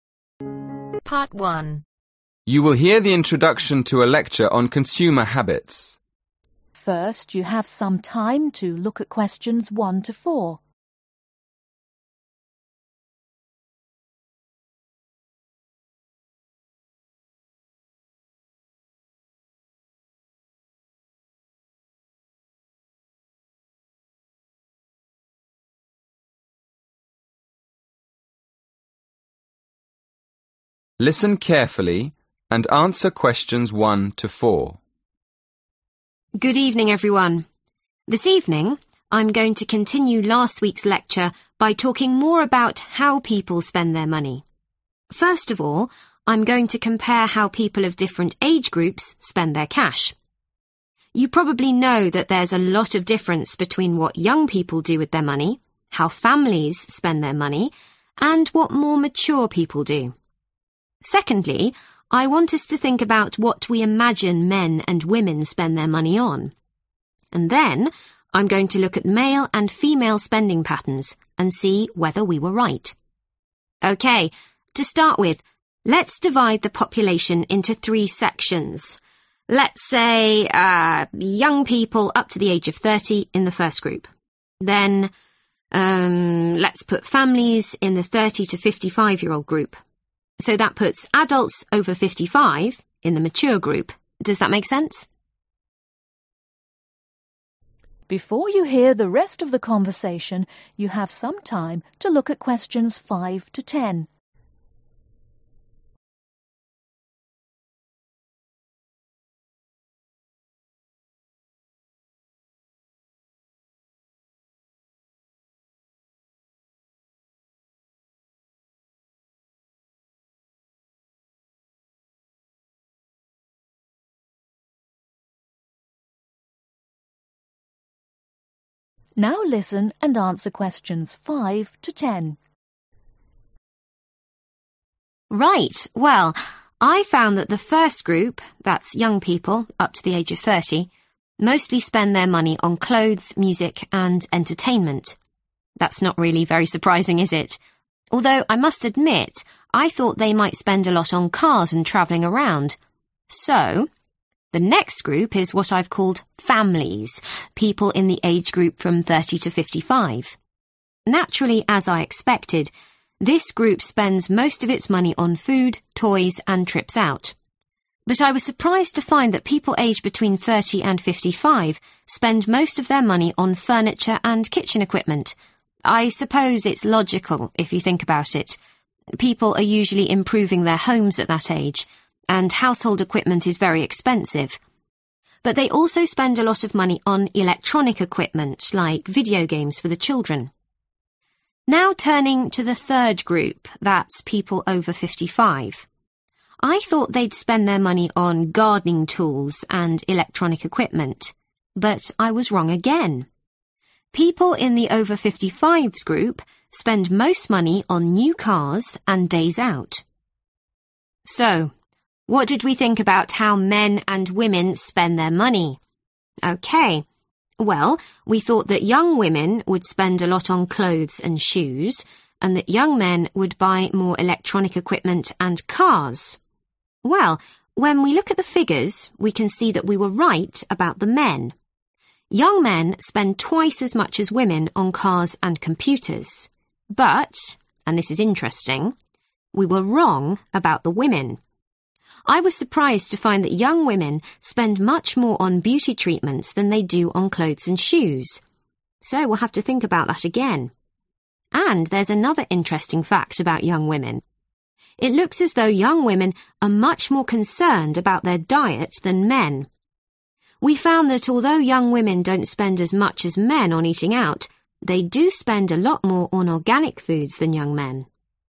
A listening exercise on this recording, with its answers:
Complete the notes below. Write NO MORE THAN TWO WORDS AND/OR A NUMBER for each answer.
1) - more (1)............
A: Mature People

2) Male and female (2)............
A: Spending Patterns

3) - young people aged up to (3)............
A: 30

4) - mature adults over (4)............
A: 55

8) What do men spend twice as much as women on ?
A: Cars and Computers

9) What do women spend most on ?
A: Beauty Treatments

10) Which group spends most on eating in restaurants ?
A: Young Men